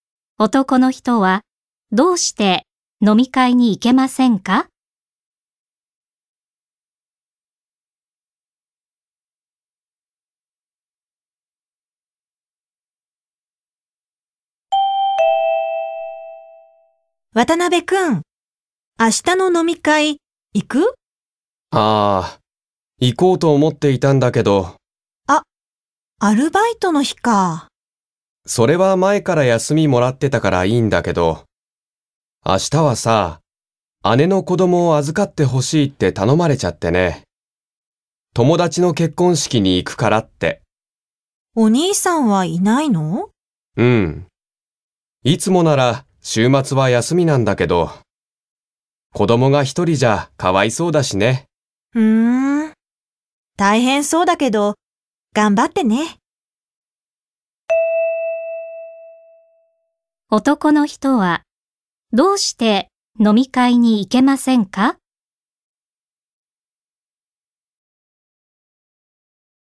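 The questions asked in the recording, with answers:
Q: 男の人はどうして飲み会に行けませんか?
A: 姉の子供を預からなければならないから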